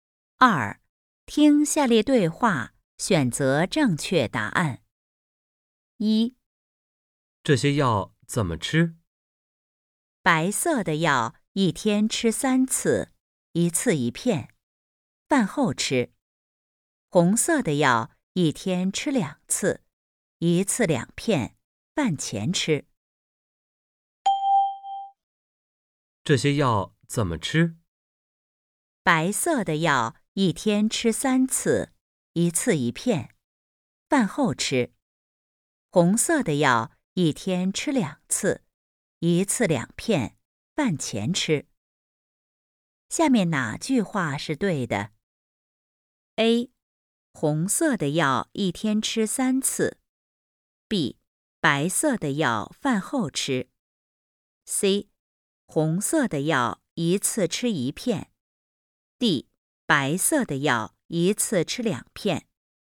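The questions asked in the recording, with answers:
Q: 下面哪句话是对的?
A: B: 白色的药饭后吃。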